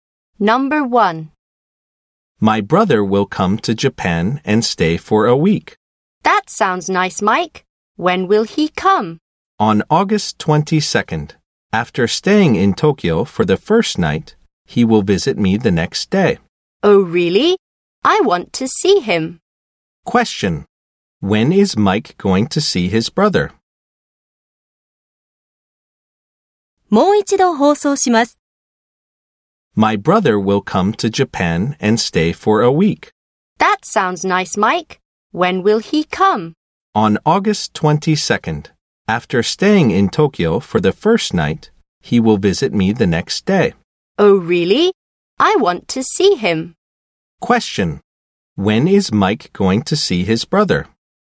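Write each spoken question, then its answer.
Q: When is Mike going to see his brother?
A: On August 23rd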